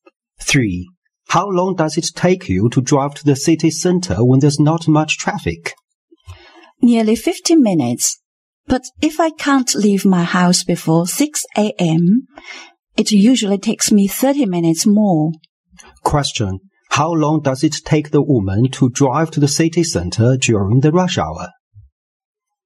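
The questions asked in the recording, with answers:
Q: How long does it take the woman to drive to the city center during the rush hour?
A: About 80 minutes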